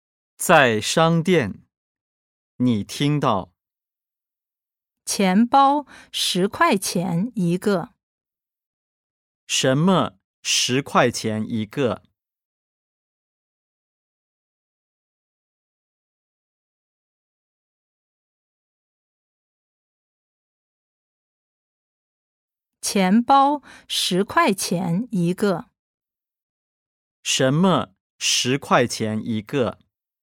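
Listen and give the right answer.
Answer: 钱包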